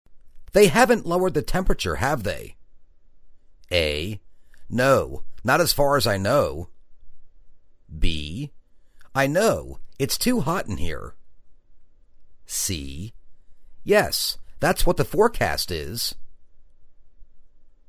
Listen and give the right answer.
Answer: No, not as far as I know.